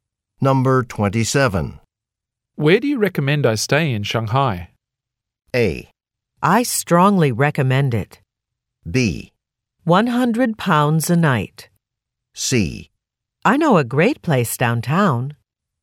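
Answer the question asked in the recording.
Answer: C: I know a great place downtown.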